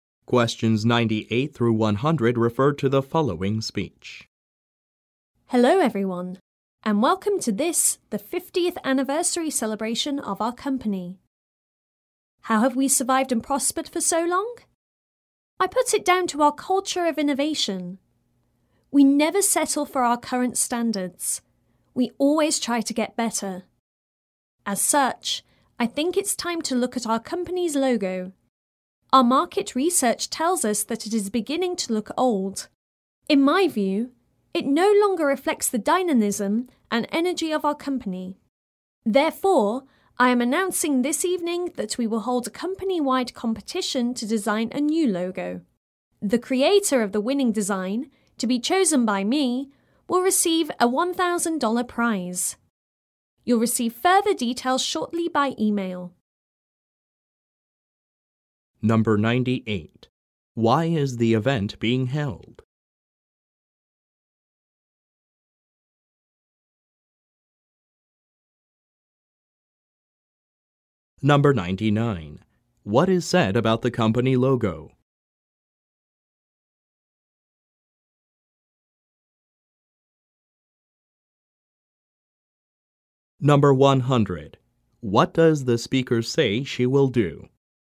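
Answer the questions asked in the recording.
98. To celebrate the company's 50th anniversary
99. It is beginning to look old
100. Choose the winning logo design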